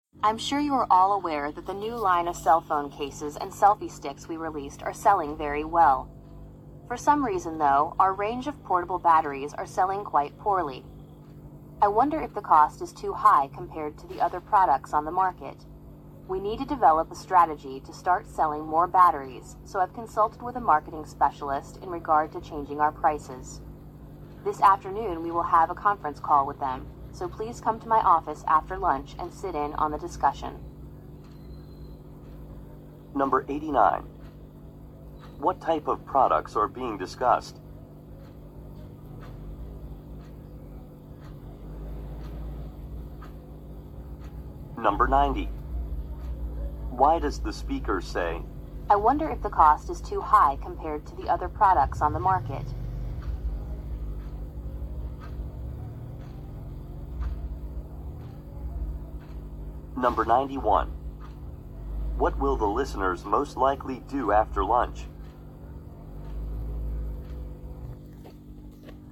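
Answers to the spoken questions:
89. Mobile phone accessories
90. To suggest that the batteries are selling poorly because they cost too much
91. Join a conference call in the speaker's office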